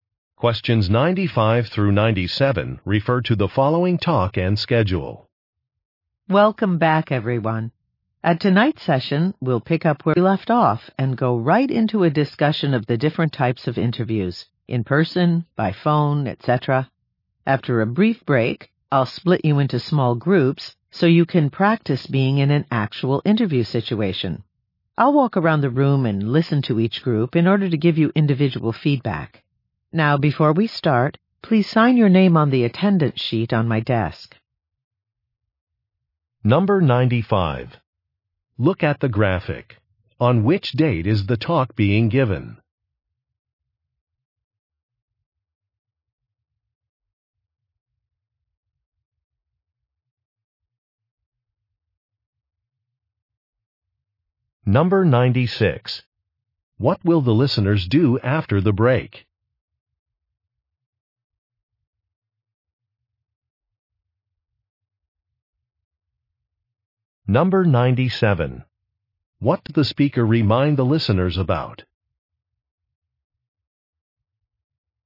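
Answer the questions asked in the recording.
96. Practice interviews in small groups
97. To sign the attendance sheet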